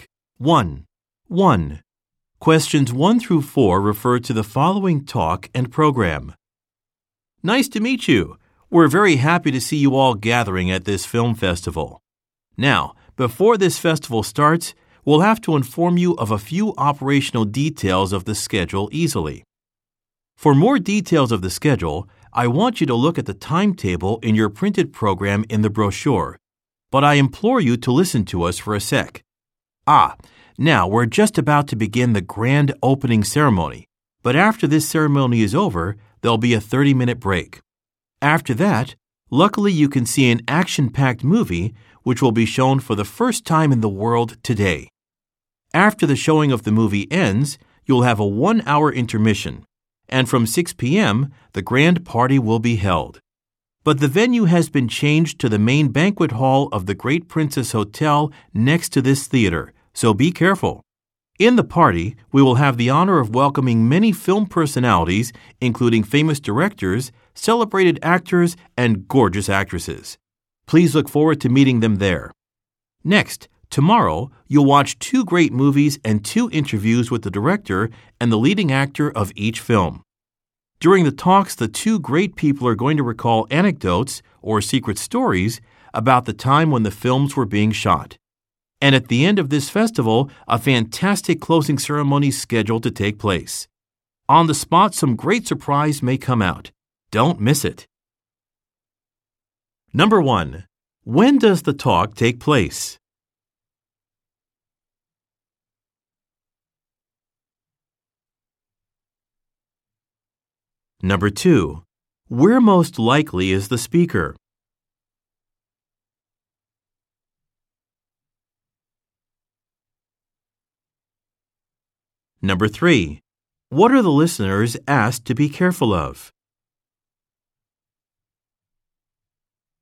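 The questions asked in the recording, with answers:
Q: When does the talk take place?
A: Just before the festival's opening ceremony

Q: Where most likely is the speaker?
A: At a film festival in a theater

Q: What are the listeners asked to be careful of?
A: The party venue has changed to the main banquet hall of the Great Princess Hotel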